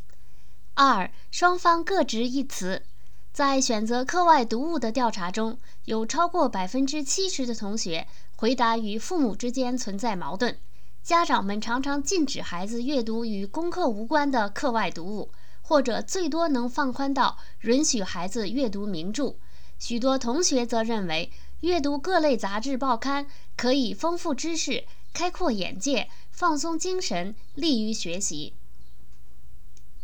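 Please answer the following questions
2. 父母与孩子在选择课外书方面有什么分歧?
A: 家长禁止孩子读与功课无关的课外读物,最多允许读名著;孩子认为读各类杂志报刊可以丰富知识、开阔眼界、放松精神、利于学习。

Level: 3rd Year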